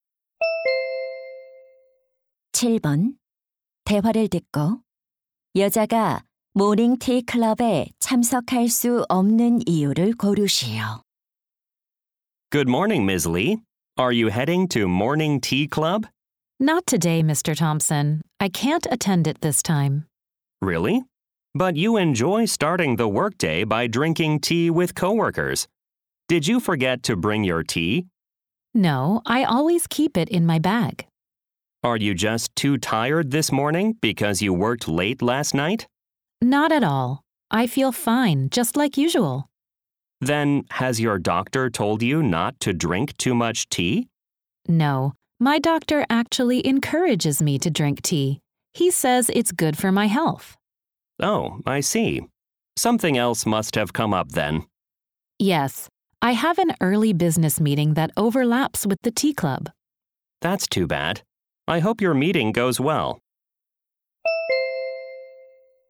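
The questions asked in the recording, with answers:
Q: 대화를 듣고 여자가 모닝티 클럽에 참석할 수 없는 이유를 고르시오.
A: 이른 업무 회의가 있어서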